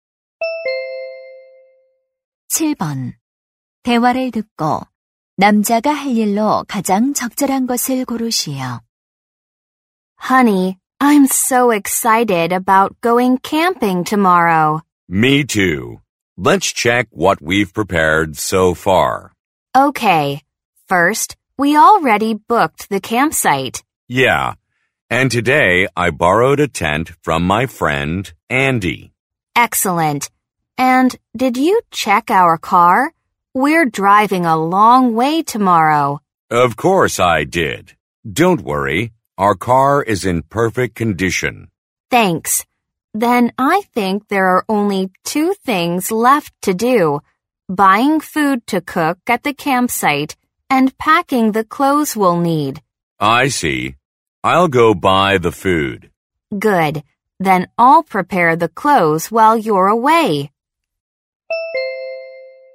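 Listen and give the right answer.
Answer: 캠핑 음식 사러 가기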